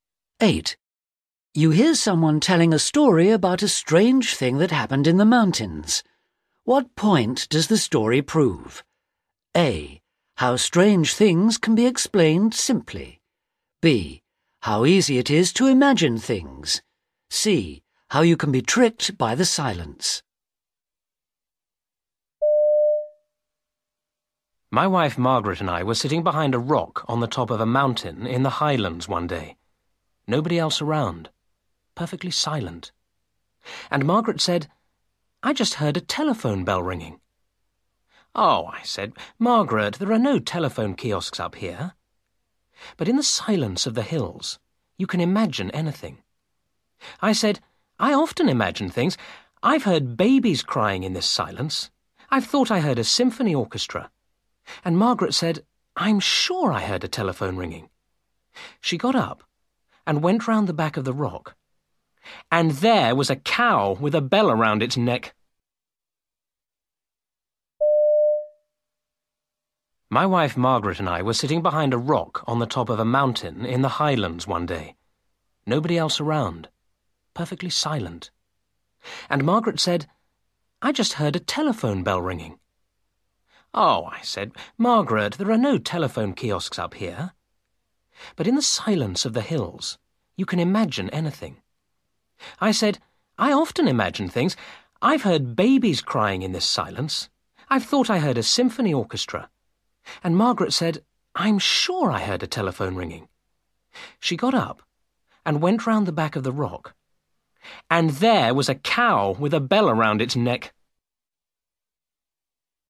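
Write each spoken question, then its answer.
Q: What point does the story prove?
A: A: How strange things can be explained simply.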